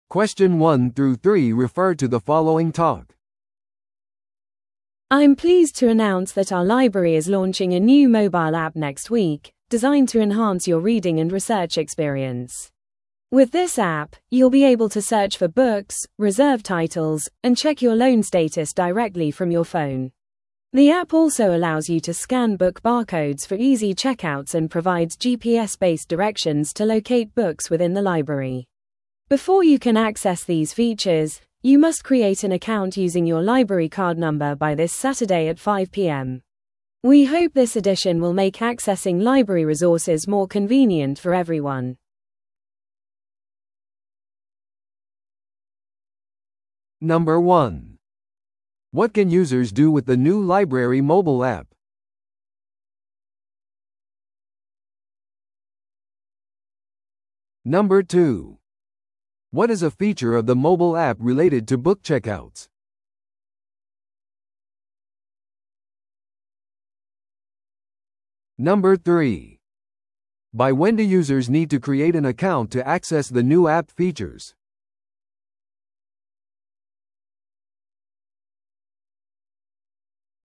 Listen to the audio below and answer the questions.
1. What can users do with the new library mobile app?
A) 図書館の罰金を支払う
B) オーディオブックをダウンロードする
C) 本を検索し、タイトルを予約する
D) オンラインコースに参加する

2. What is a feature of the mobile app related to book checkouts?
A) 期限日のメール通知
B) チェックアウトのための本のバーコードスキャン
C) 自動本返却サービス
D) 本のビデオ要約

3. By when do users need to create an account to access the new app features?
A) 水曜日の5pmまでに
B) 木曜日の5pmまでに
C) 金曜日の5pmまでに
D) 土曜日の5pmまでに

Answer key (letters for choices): 1C, 2B, 3D

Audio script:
I'm pleased to announce that our library is launching a new mobile app next week, designed to enhance your reading and research experience. With this app, you'll be able to search for books, reserve titles, and check your loan status directly from your phone. The app also allows you to scan book barcodes for easy checkouts and provides GPS-based directions to locate books within the library. Before you can access these features, you must create an account using your library card number by this Saturday at 5pm. We hope this addition will make accessing library resources more convenient for everyone.